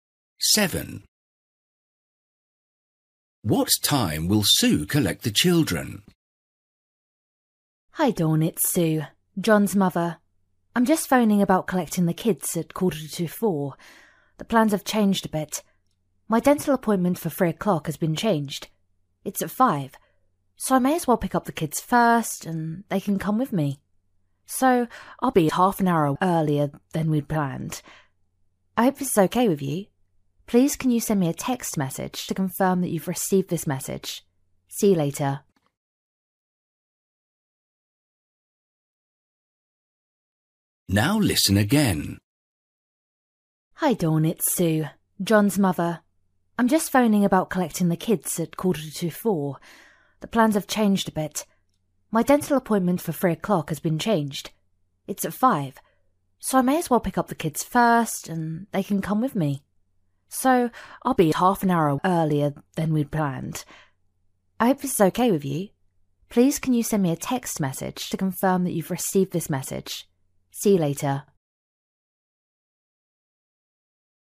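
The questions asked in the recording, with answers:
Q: What time will Sue collect the children?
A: 3:15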